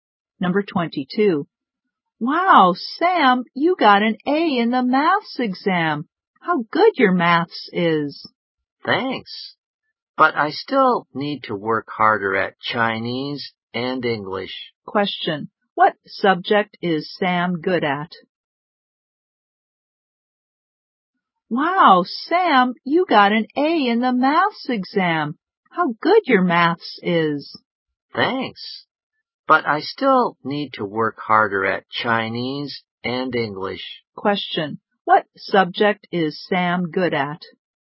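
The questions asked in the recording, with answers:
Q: What subject is Sam good at?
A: Maths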